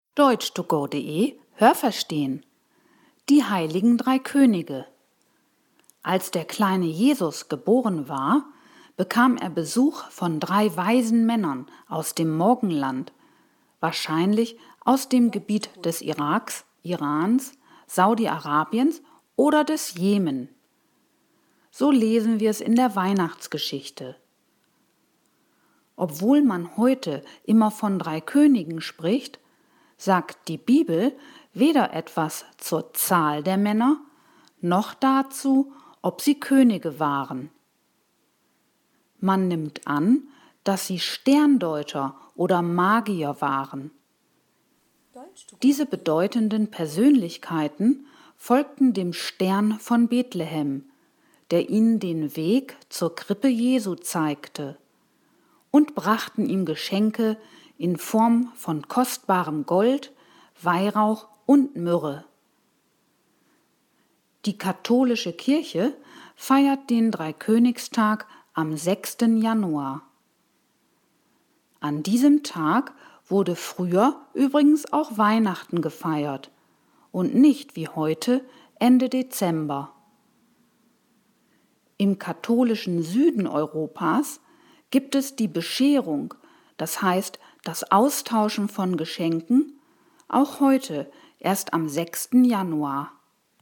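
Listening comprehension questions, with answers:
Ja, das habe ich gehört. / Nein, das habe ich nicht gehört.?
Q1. Als Jesus geboren war, besuchten ihn drei weise Männer aus dem Morgenland.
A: Ja, das habe ich gehört.

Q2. In der Bibel steht, dass diese Männer Könige waren.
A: Nein, das habe ich nicht gehört.

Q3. Die sogenannten Heiligen Drei Könige waren vermutlich Sterndeuter oder Magier.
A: Ja, das habe ich gehört.

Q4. Die drei Könige brachten dem Jesuskind Silber, Weintrauben und Mandeln.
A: Nein, das habe ich nicht gehört.

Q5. In der katholischen Kirche feiert man am 6. Januar den Dreikönigstag.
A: Ja, das habe ich gehört.

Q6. Am 6. Januar war früher auch der Nikolaustag.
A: Nein, das habe ich nicht gehört.

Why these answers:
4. Sie brachten Gold und außerdem Weihrauch und Myrrhe. Das waren damals teure und begehrte Düfte.
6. Man feierte früher am 6. Januar Weihnachten.

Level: A2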